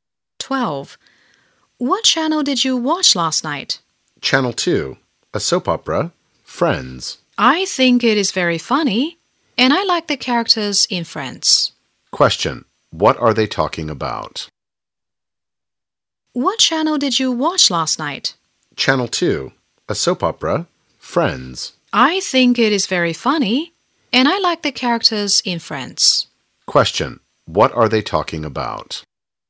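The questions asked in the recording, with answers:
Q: what are they talking about?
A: A soap opera, Friends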